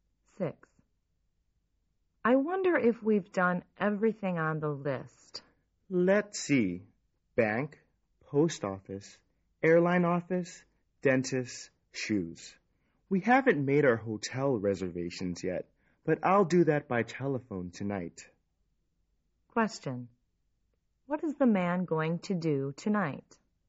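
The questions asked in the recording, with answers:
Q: What is the man going to do tonight?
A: Make hotel reservations by telephone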